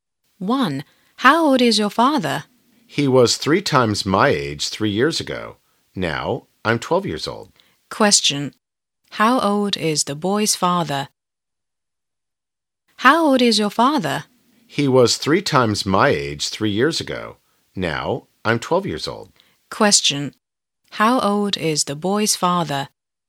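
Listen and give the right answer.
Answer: 30 years old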